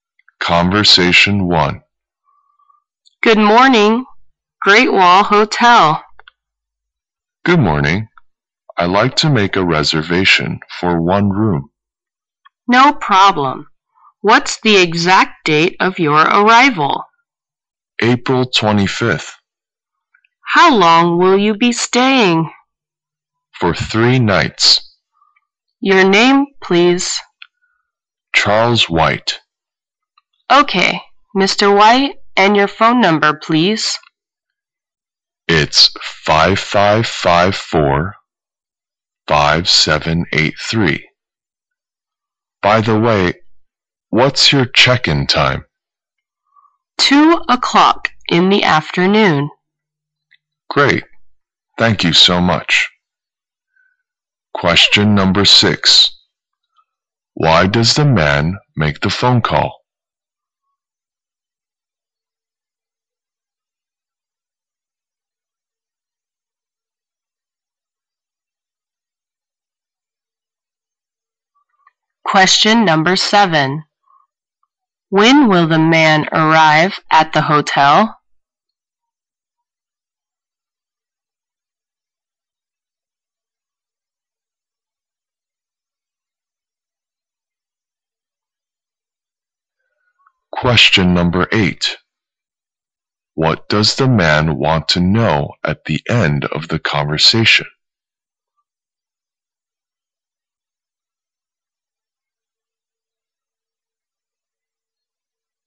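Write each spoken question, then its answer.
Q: Why does the man make the phone call?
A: To reserve a hotel room

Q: When will the man arrive at the hotel?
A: April 25th

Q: What does the man want to know at the end of the conversation?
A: The check-in time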